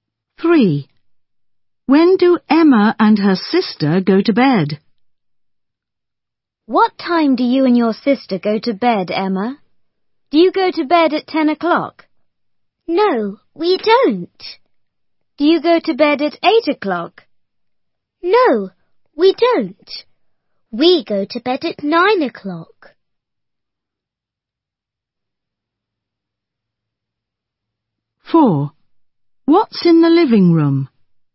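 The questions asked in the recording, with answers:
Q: When do Emma and her sister go to bed?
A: At 9 o'clock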